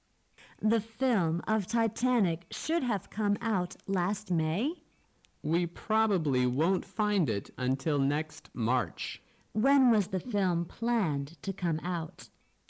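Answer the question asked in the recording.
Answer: Last May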